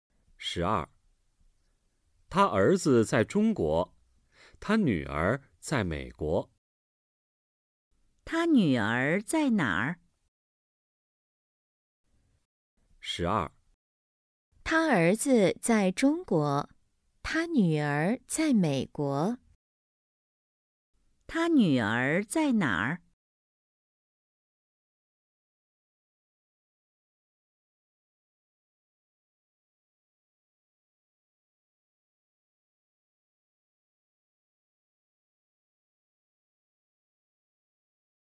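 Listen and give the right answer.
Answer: 在美国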